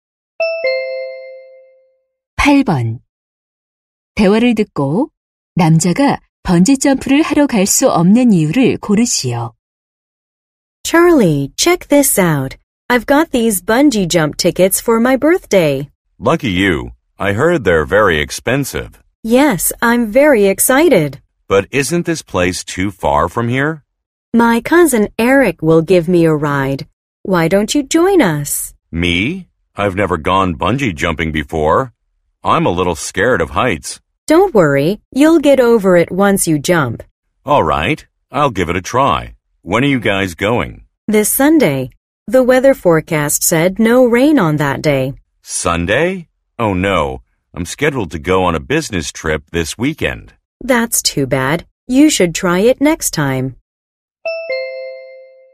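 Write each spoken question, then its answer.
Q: 대화를 듣고 남자가 번지점프를 하러 갈 수 없는 이유를 고르시오.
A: 이번 주말에 출장이 잡혀 있어서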